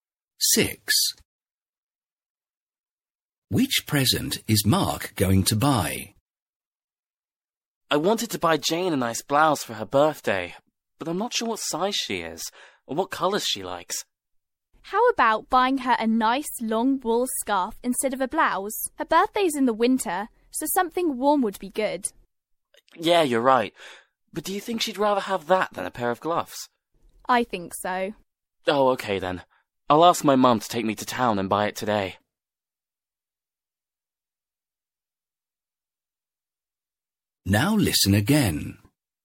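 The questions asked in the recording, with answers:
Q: Which present is Mark going to buy?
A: A long wool scarf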